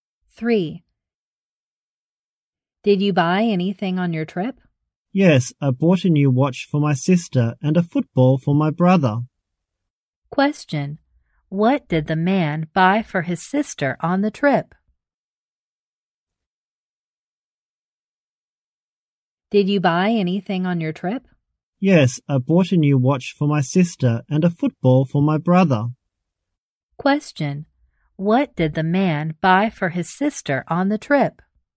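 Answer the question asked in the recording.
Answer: A new watch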